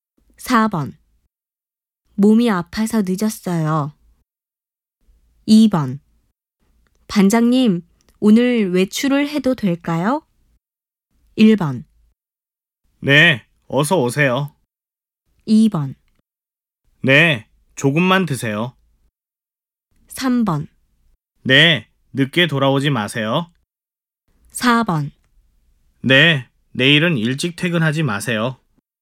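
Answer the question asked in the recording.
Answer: 3: 네, 늦게 돌아오지 마세요.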